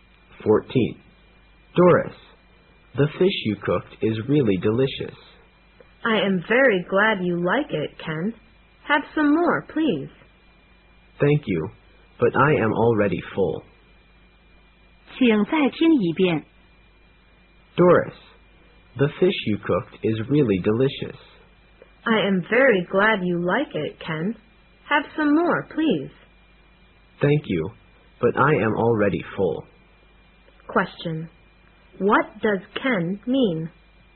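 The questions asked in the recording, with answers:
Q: What does Ken mean?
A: He is full and doesn't want more fish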